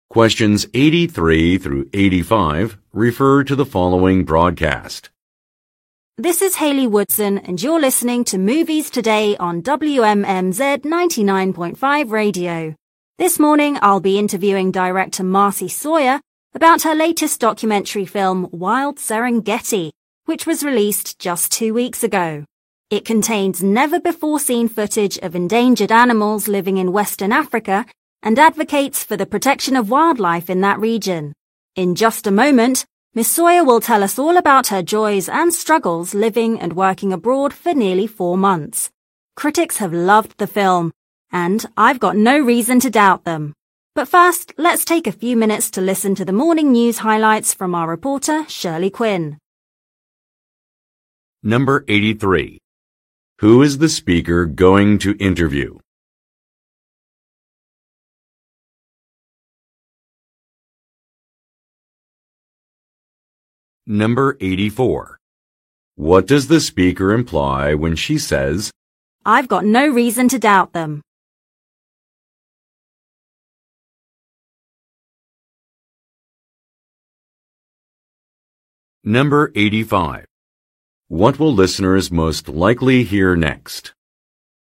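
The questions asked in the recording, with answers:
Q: Who is the speaker going to interview?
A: A film director, Marcy Sawyer

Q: What will listeners most likely hear next?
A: The morning news highlights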